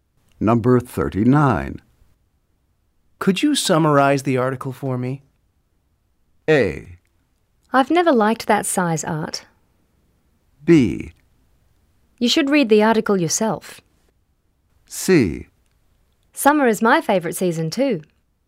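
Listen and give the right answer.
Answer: B: You should read the article yourself.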